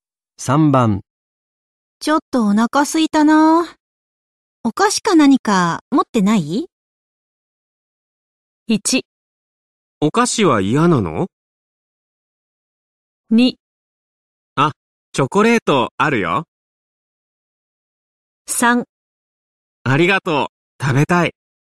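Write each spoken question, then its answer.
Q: ちょっとお腹すいたな。お菓子か何か持ってない?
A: 2: あ、チョコレートあるよ。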